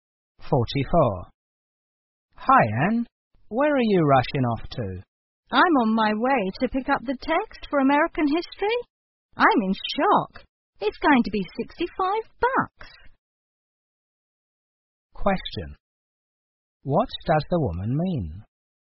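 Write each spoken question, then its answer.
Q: What does the woman mean?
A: The textbook is surprisingly expensive.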